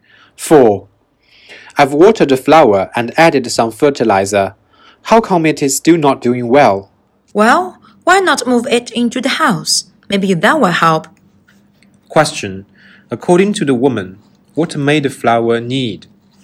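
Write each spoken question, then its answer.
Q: According to the woman, what may the flower need?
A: To be moved indoors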